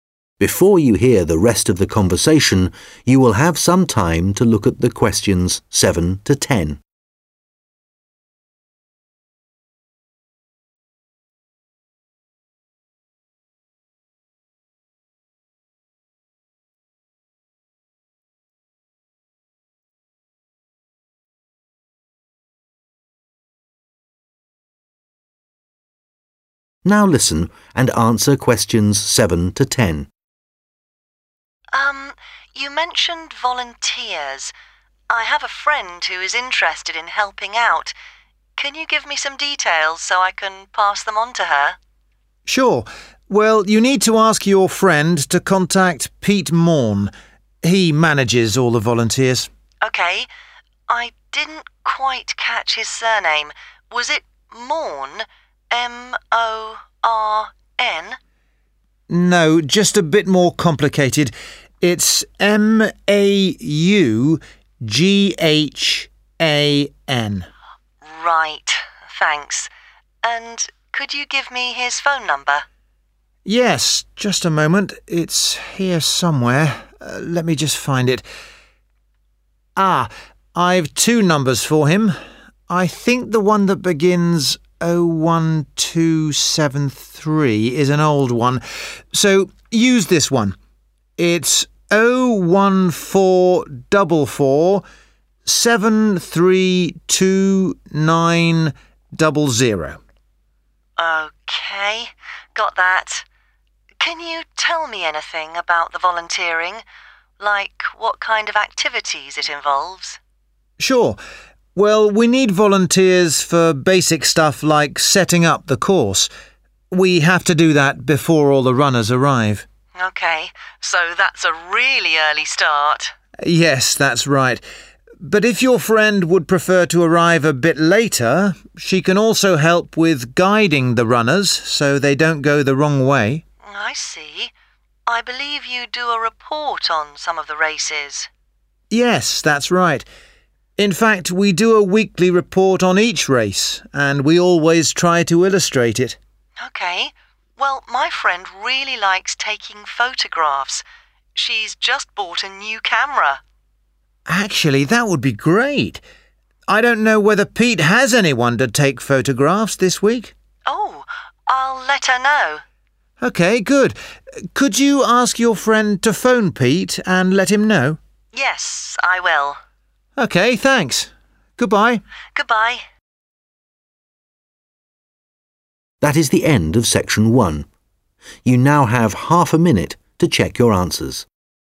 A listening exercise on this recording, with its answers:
Complete the notes below. Write NO MORE THAN TWO WORDS AND / OR A NUMBER for each answer.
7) Contact name: Pete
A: maughan

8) Phone number:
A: 01444732900

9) the runners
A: guiding/guide

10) for the weekly report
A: taking/take photos/photographs

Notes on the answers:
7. No – just a bit more complicated – it's M-A-U-G-H-A-N (Q7).
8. use this one: it's 0-1-4double 4-7-3-2-9-double zero (Q8).
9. Một trong các công việc là hướng dẫn người chạy không đi sai đường.
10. Một phần báo cáo hàng tuần có chụp ảnh, và bạn của cô ấy thích chụp ảnh.